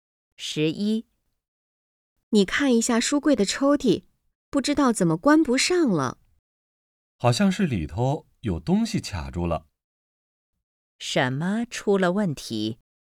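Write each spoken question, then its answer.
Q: 什么出了问题?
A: 书柜的抽屉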